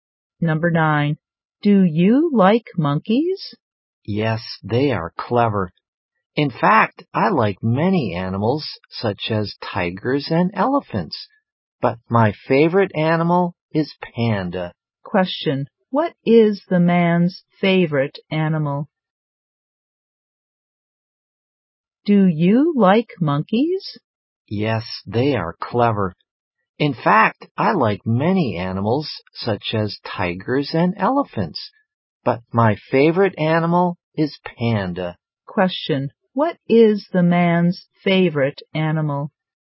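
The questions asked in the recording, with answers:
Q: Question. What is the man's favorite animal?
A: Panda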